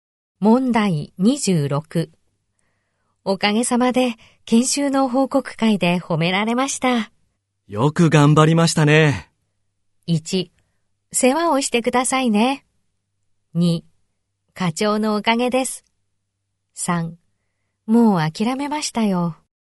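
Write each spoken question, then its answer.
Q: おかげさまで、研修の報告会で褒められました。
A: 2: 課長のおかげです。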